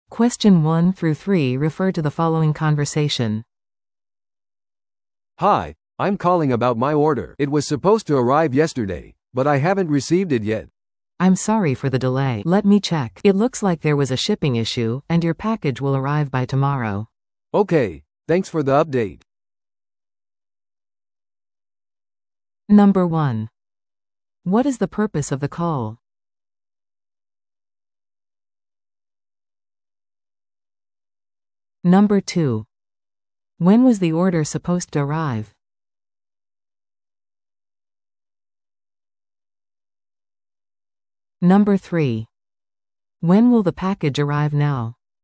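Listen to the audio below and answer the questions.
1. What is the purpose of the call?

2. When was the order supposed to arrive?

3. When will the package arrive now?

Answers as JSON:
{"1": "To ask about an order that has not arrived", "2": "Yesterday", "3": "By tomorrow"}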